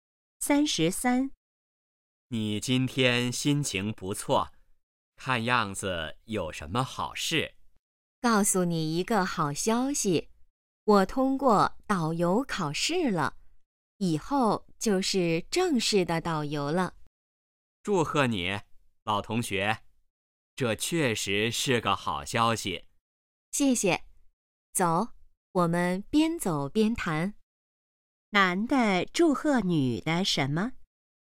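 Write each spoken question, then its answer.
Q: 男的祝贺女的什么?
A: 通过了导游考试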